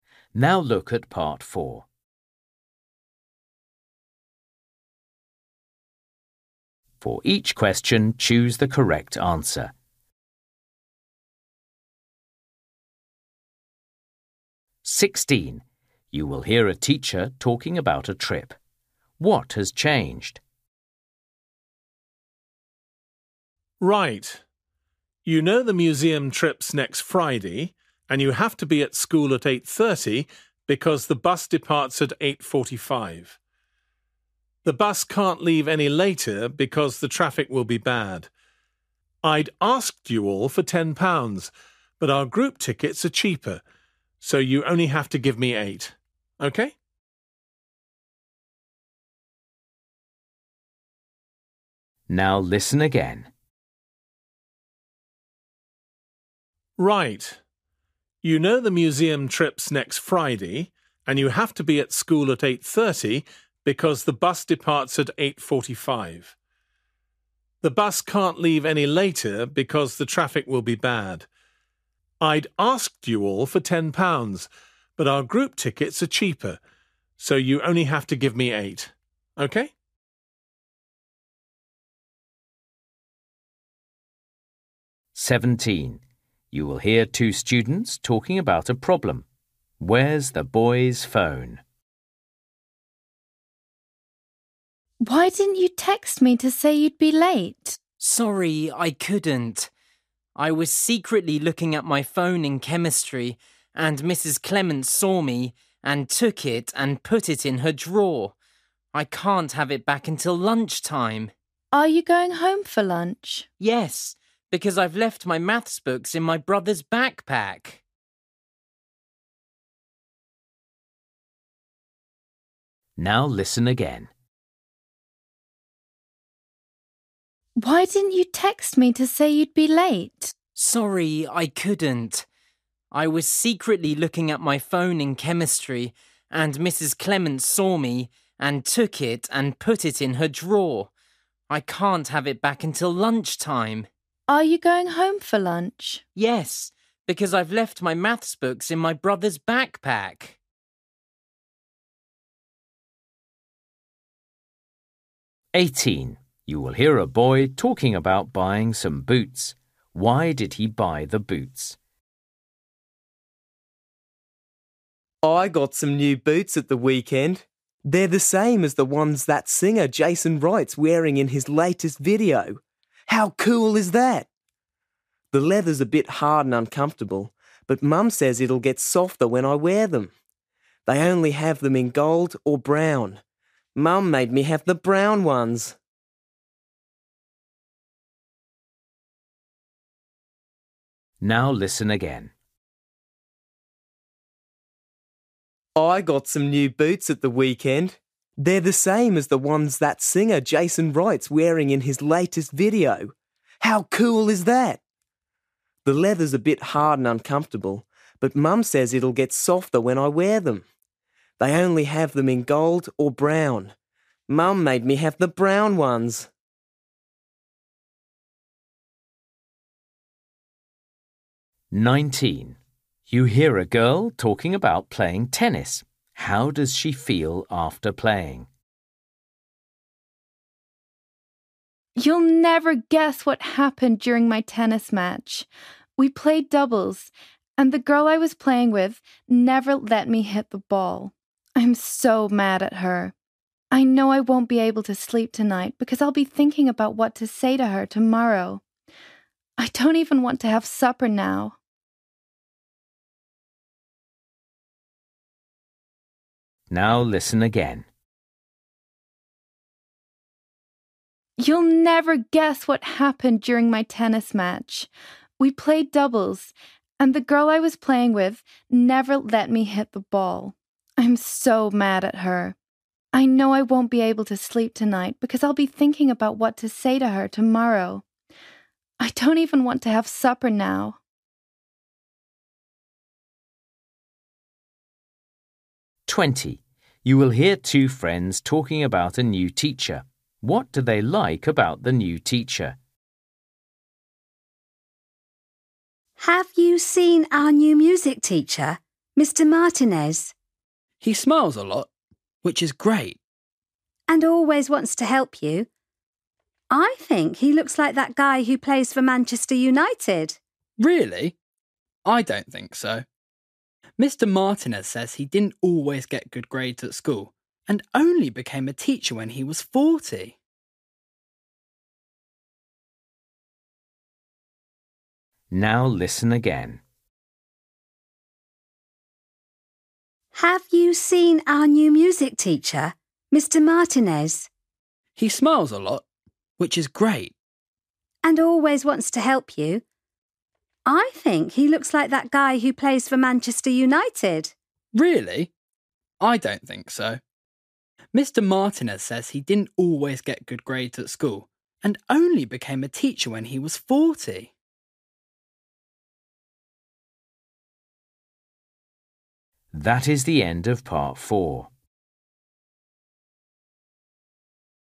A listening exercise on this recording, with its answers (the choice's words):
For each question, choose the correct answer.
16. What has changed?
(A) the cost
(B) the time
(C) the transport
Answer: the cost

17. Where's the boy's phone?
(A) in the teacher's desk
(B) in his brother's bag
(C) in his house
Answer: in the teacher's desk

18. Why did he buy the boots?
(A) They're comfortable.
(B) He likes the colour.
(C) They're in fashion.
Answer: They're in fashion.

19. How does she feel after playing?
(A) angry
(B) hungry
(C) tired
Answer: angry

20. What do they like about the new teacher?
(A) He's clever.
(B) He's friendly.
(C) He's famous.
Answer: He's friendly.

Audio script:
16 You will hear a teacher talking about a trip. What has changed?
Man: Right. You know the museum trip's next Friday and you have to be at school at eight thirty because the bus departs at eight forty-five. The bus can't leave any later because the traffic will be bad. I'd asked you all for ten pounds, but our group tickets are cheaper, so you only have to give me eight.
17 You will hear two students talking about a problem. Where's the boy's phone?
Girl: Why didn't you text me to say you'd be late?
Boy: Sorry, I couldn't. I was secretly looking at my phone in chemistry, and Mrs Clements saw me, and took it and put it in her drawer. I can't have it back until lunchtime.
Girl: Are you going home for lunch?
Boy: Yes, because I've left my maths books in my brother's backpack.
18 You will hear a boy talking about buying some boots.
Boy: I got some new boots at the weekend. They're the same as the ones that singer Jason Wright's wearing in his latest video. How cool is that? The leather's a bit hard and uncomfortable, but Mum says it'll get softer when I wear them. They only have them in gold or brown. Mum made me have the brown ones!
19 You will hear a girl talking about playing tennis.
Girl: You'll never guess what happened during my tennis match! We played doubles and the girl I was playing with never let me hit the ball. I'm so mad at her. I know I won't be able to sleep tonight because I'll be thinking about what to say to her tomorrow. I don't even want to have supper now!
20 You will hear two friends talking about a new teacher.
Girl: Have you seen our new music teacher, Mr Martinez?
Boy: He smiles a lot, which is great.
Girl: And always wants to help you. I think he looks like that guy who plays for Manchester United.
Boy: Really? I don't think so. Mr Martinez says he didn't always get good grades at school and only became a teacher when he was forty.

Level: KET (A2)